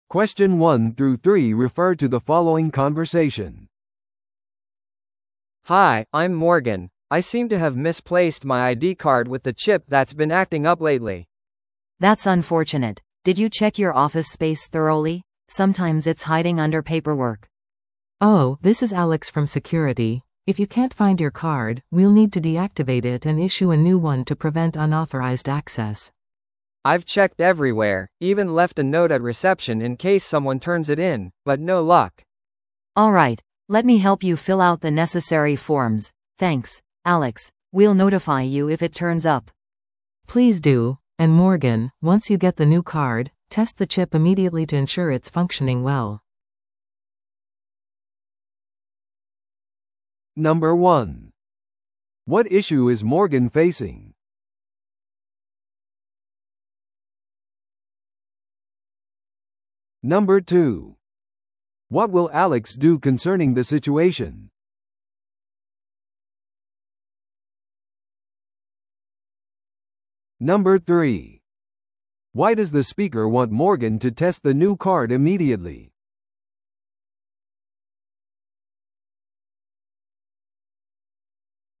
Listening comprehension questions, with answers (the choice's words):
Listen to the audio below and answer the questions.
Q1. What issue is Morgan facing?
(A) 彼は自分のメールにアクセスできない。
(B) 彼は自分のロッカーの組み合わせを忘れた。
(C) 彼は自分のコンピューターに問題を抱えている。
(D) 彼は自分のIDカードを紛失した。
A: 彼は自分のIDカードを紛失した。

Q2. What will Alex do concerning the situation?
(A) モーガンのオフィスでカードを探すのを手伝う。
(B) セキュリティシステムのソフトウェアをアップグレードする。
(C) 失われたカードを無効にして、新しいものを発行する。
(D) 会社の掲示板に行方不明の通知を投稿する。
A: 失われたカードを無効にして、新しいものを発行する。

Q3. Why does the speaker want Morgan to test the new card immediately?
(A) 彼が新しいID番号を覚えていることを確かめるため。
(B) 新しいチップが適切に機能していることを保証するため。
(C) 必要な全エリアへのアクセスが可能であることを確認するため。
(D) 古いカードが無効にされる前にそれを検証するため。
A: 新しいチップが適切に機能していることを保証するため。

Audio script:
A: Hi, I'm Morgan. I seem to have misplaced my ID card with the chip that's been acting up lately.
B: That's unfortunate. Did you check your office space thoroughly? Sometimes it's hiding under paperwork.
C: Oh, this is Alex from security. If you can't find your card, we'll need to deactivate it and issue a new one to prevent unauthorized access.
A: I've checked everywhere, even left a note at reception in case someone turns it in, but no luck.
B: Alright, let me help you fill out the necessary forms. Thanks, Alex, we'll notify you if it turns up.
C: Please do. And Morgan, once you get the new card, test the chip immediately to ensure it's functioning well.